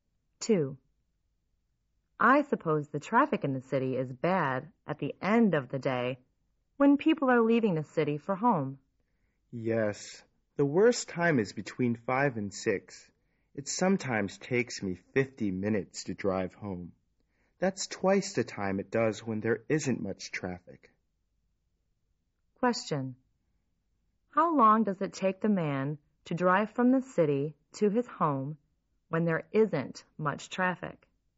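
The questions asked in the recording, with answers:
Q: How long does it take the man to drive from the city to his home when there isn't much traffic?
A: 25 minutes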